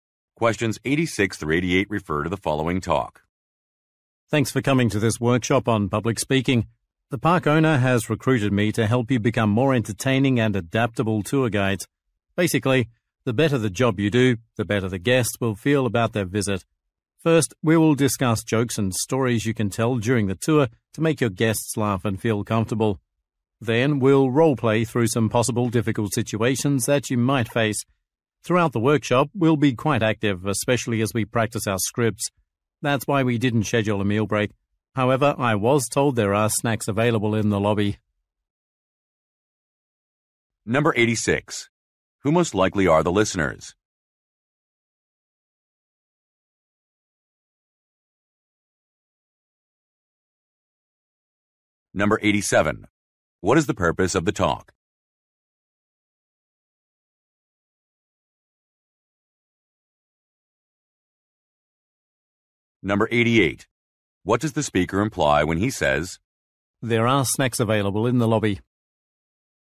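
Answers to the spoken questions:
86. Tour guides
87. To introduce a public speaking workshop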